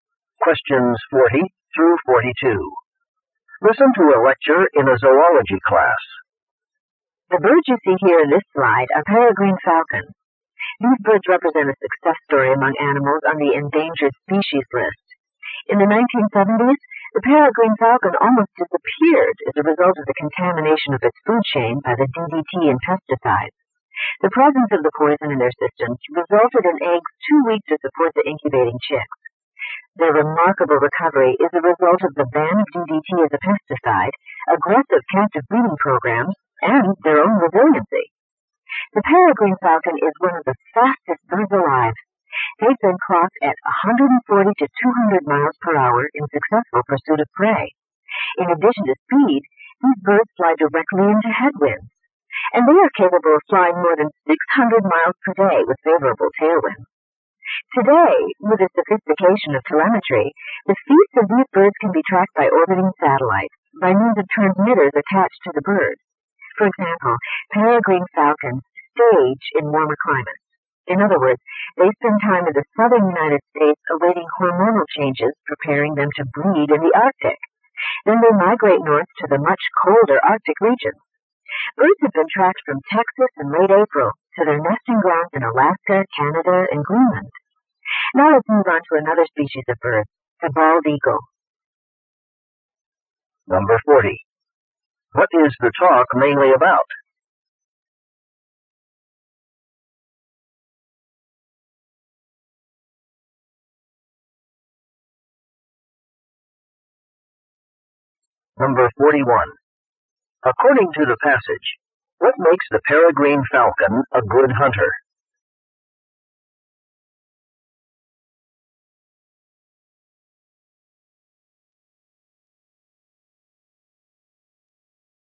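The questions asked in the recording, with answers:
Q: What is the talk mainly about?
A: The peregrine falcon's recovery and abilities.

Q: According to the passage, what makes the peregrine falcon a good hunter?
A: Its great speed.

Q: How do biologists track peregrine falcons over long distances?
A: By satellite, using transmitters attached to the birds.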